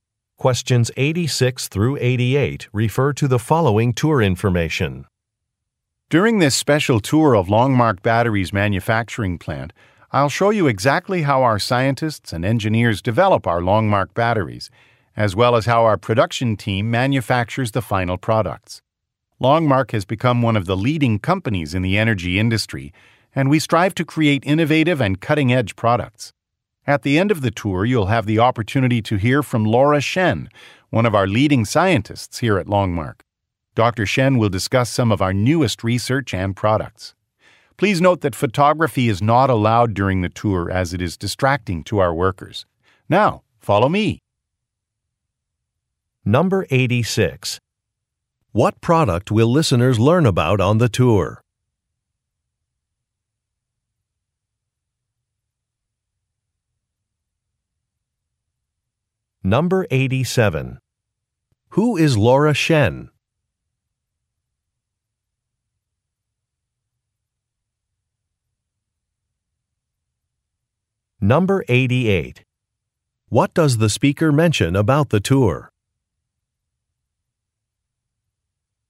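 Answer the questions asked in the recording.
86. Batteries
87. One of Longmark's leading scientists
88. Photography is not allowed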